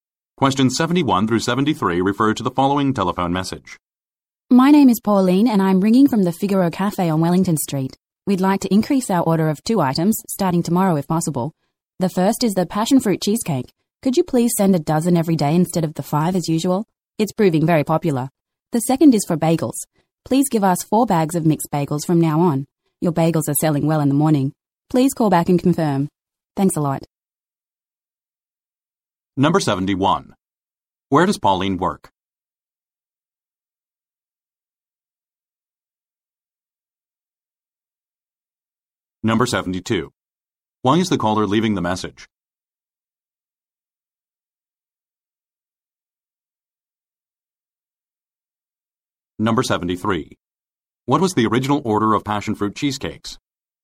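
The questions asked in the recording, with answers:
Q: Where does Pauline work?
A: At the Figaro Cafe on Wellington Street

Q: Why is the caller leaving the message?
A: To increase an order

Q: What was the original order of passion fruit cheesecakes?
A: Five every day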